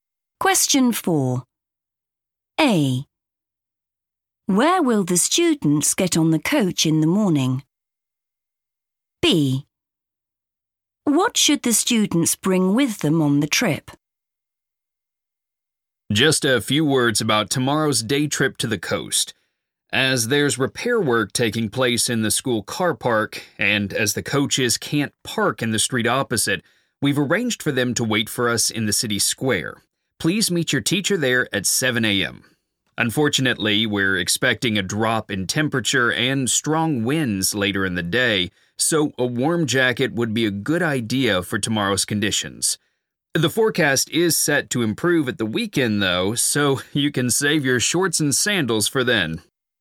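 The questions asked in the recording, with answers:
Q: Where will the students get on the coach in the morning?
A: the city square

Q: What should the students bring with them on the trip?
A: a warm jacket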